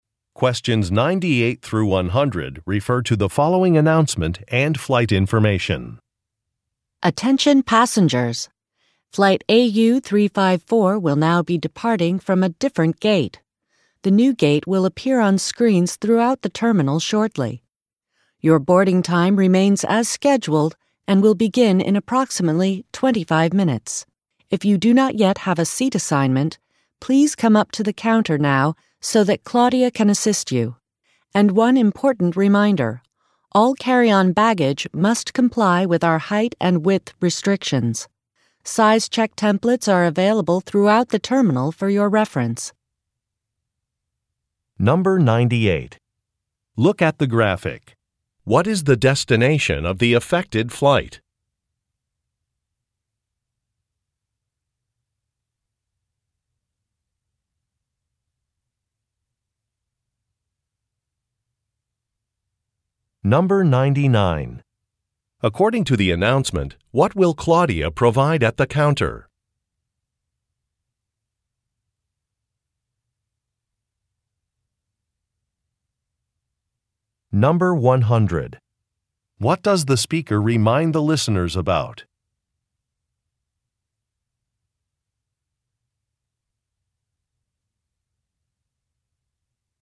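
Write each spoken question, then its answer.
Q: According to the announcement, what will Claudia provide at the counter?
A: Seat assignments

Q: What does the speaker remind the listeners about?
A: Carry-on baggage must meet height and width (size) restrictions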